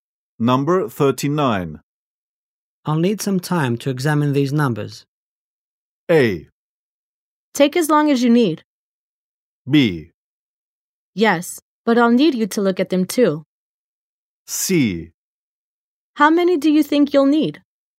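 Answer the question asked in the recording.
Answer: A: Take as long as you need.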